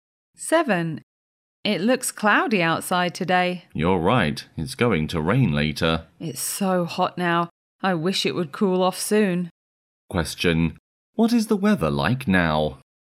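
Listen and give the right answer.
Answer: Hot and cloudy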